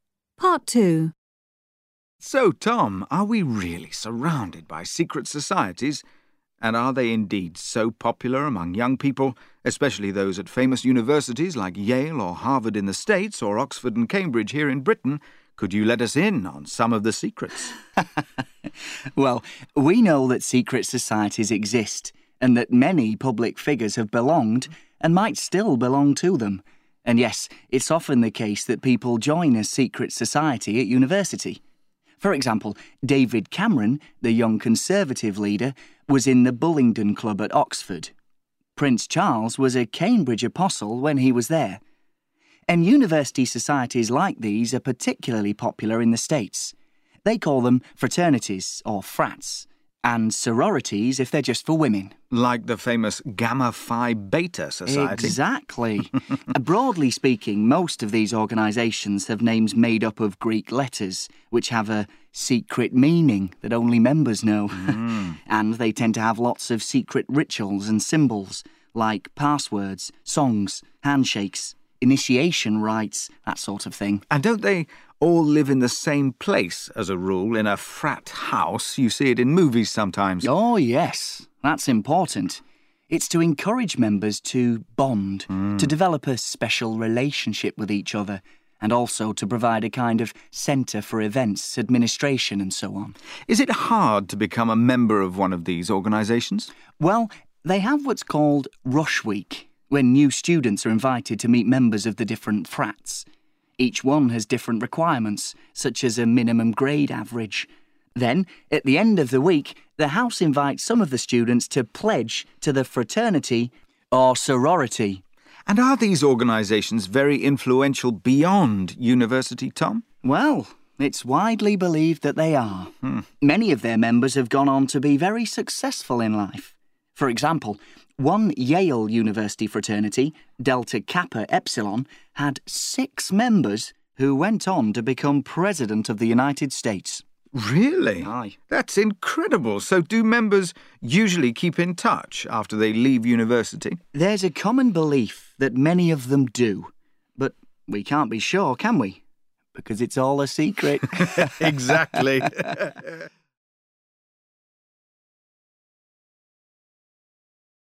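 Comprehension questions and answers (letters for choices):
Listen to Part 2 and complete each gap with only one word from the box below.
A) belong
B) women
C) Greek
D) passwords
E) Rush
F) requirement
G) presidents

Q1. Famous public figures often 1 1 to secret societies.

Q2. In the USA, Gamma Phi Beta is a famous university sorority, a special society for 2 2 .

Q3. The names of such societies often contain 3 3 letters.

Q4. Only members know the secret rituals, like 4 4 , songs and handshakes.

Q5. New members are invited to join fraternities during ' 5 5 Week'.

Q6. A minimum grade average is one type of 6 6 for fraternity membership.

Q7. Six US 7 7 formerly belonged to a fraternity at Yale.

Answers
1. A
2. B
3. C
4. D
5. E
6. F
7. G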